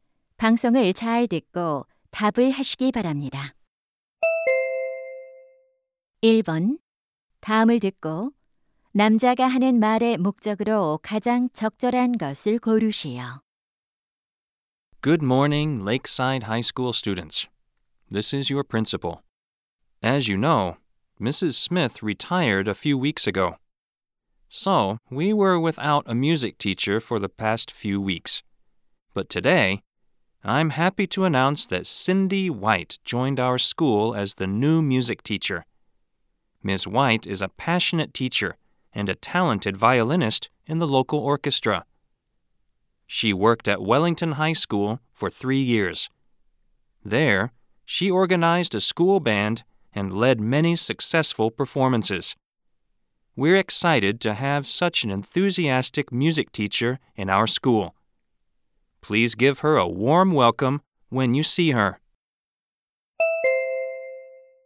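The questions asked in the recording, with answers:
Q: 다음을 듣고 남자가 하는 말의 목적으로 가장 적절한 것을 고르시오.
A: 새 음악 교사를 소개하려고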